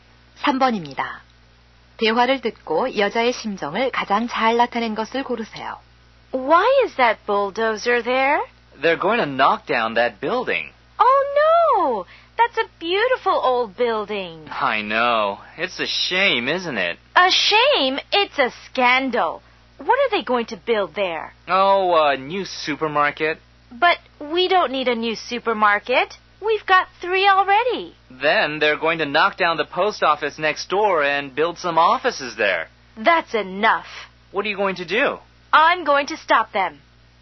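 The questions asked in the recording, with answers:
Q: 대화를 듣고 여자의 심정을 가장 잘 나타낸 것을 고르세요.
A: 화가 남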